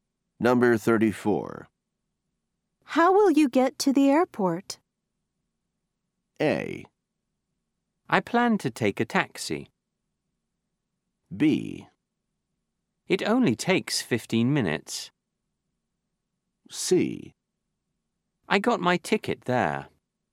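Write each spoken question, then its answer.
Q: How will you get to the airport?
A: A: I plan to take a taxi.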